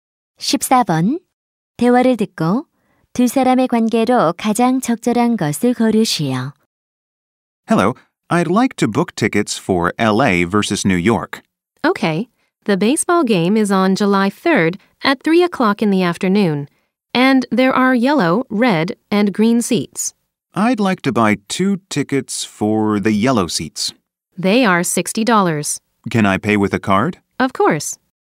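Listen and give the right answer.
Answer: 매표원과 손님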